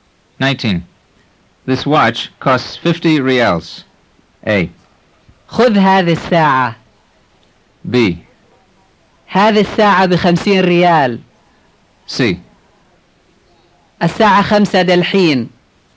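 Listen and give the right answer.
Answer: B: هذه الساعة بخمسين ريال.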